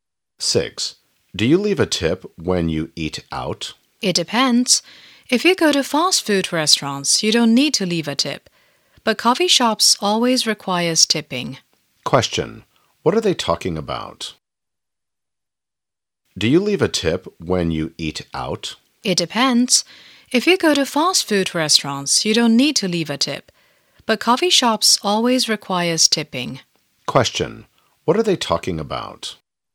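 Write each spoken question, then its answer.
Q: Question. What are they talking about?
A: Tipping when eating out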